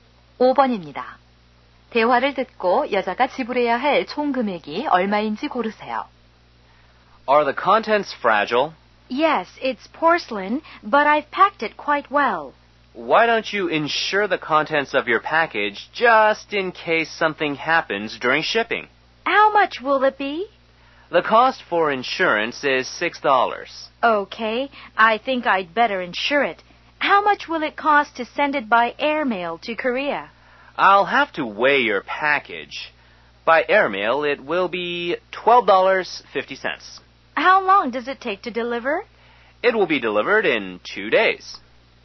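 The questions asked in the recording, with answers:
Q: 대화를 듣고 여자가 지불해야 할 총 금액이 얼마인지 고르세요.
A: 18.50달러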